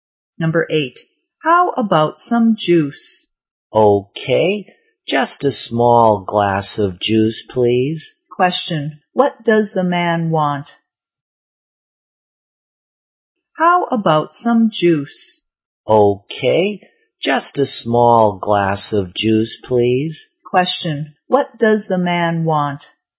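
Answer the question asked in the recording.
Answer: A small glass of juice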